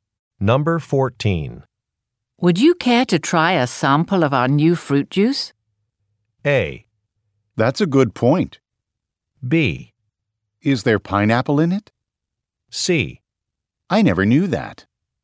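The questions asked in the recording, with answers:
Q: Would you care to try a sample of our new fruit juice?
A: B: Is there pineapple in it?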